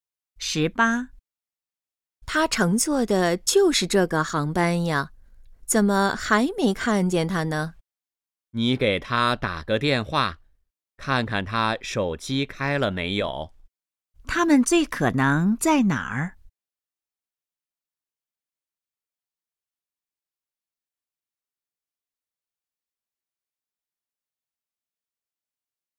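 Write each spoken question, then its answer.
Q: 他们最可能在哪儿?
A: 机场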